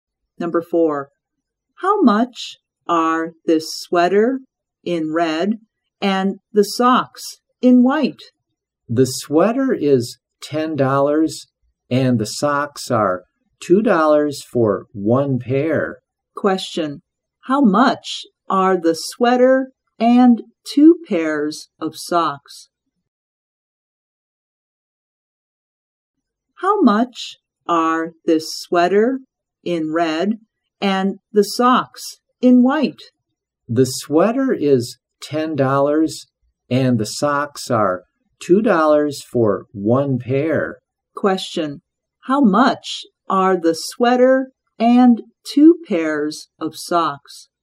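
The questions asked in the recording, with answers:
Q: Question, how much are the sweater and two pairs of socks?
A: $14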